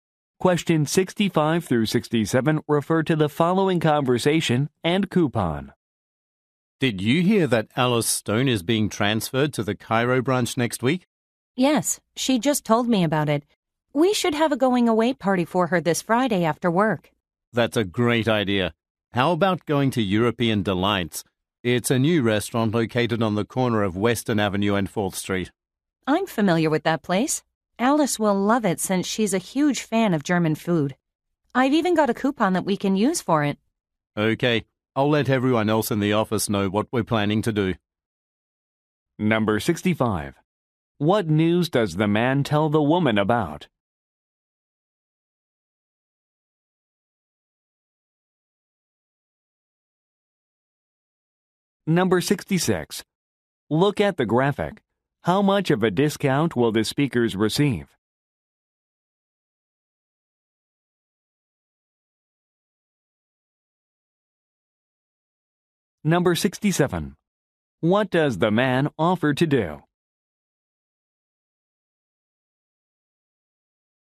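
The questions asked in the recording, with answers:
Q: What news does the man tell the woman about?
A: Alice Stone is being transferred to the Cairo branch

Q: What does the man offer to do?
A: Tell everyone else in the office about the plan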